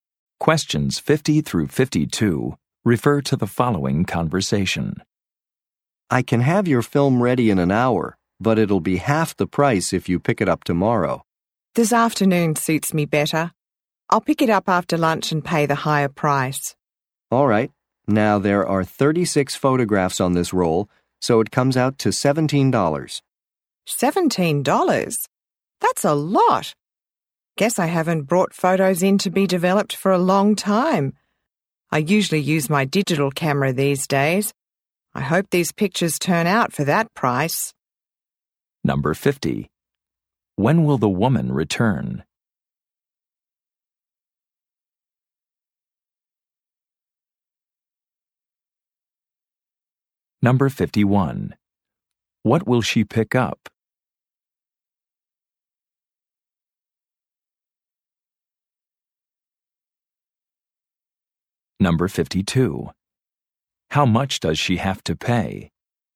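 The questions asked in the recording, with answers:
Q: When will the woman return?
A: This afternoon, after lunch

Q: What will she pick up?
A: Her developed photographs

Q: How much does she have to pay?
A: $17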